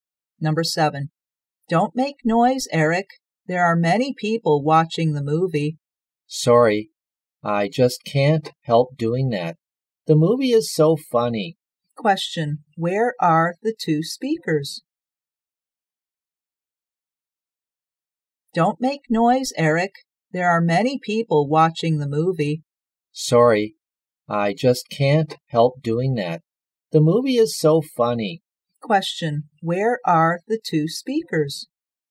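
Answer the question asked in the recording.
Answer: In a cinema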